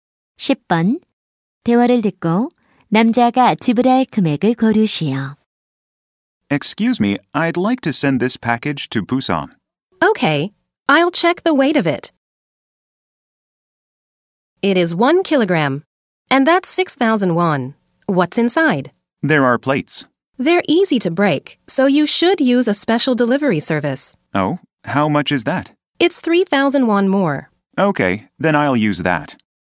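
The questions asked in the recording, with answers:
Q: 10번. 대화를 듣고 남자가 지불할 금액을 고르시오.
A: 9,000원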